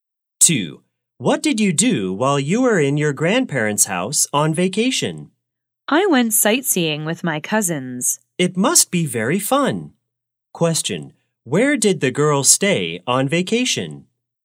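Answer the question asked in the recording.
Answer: At her grandparents' house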